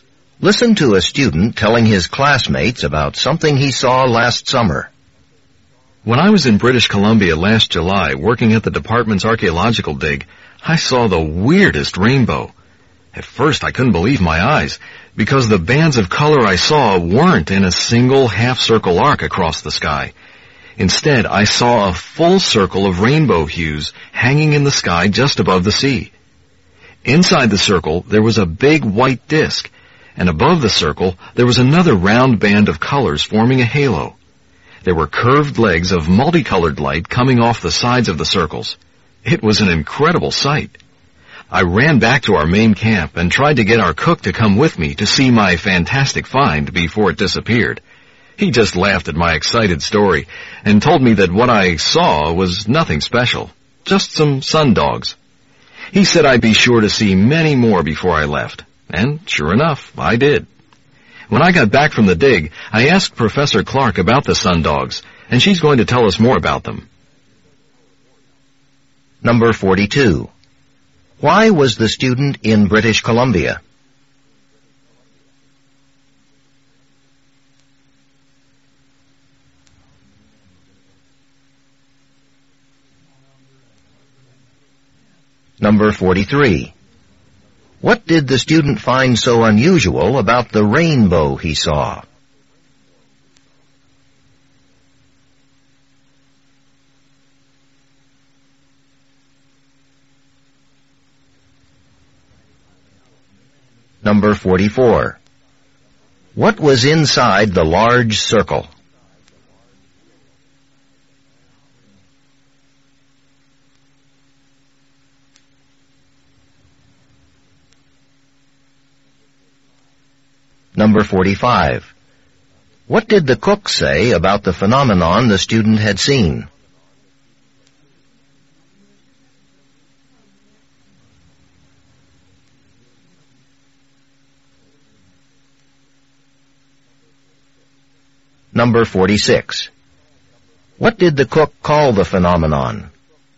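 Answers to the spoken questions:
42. He was working at the department's archaeological dig.
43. It was a full circle instead of a half-circle arc.
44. A big white disc.
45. It was nothing special, and he would see many more.
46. Sun dogs.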